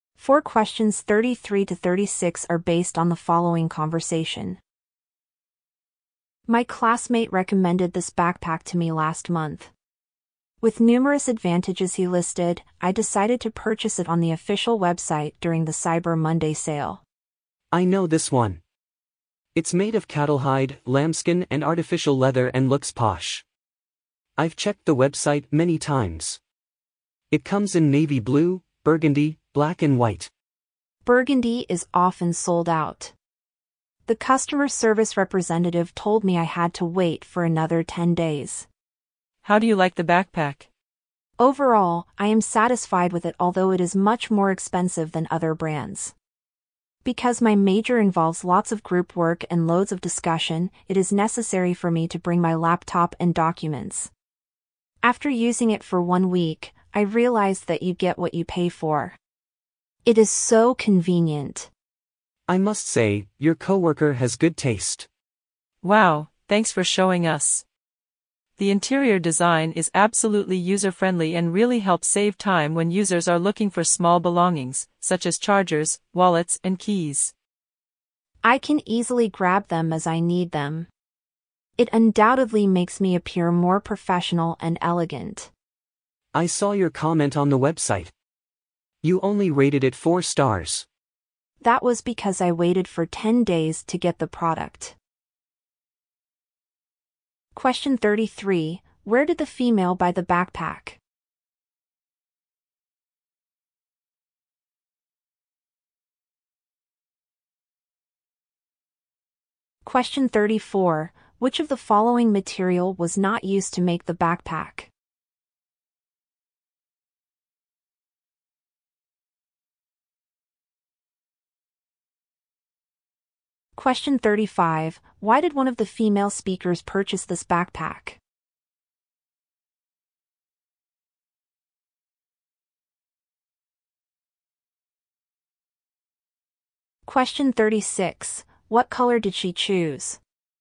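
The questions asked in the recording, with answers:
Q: Where did the female buy the backpack?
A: On the official website, during the Cyber Monday sale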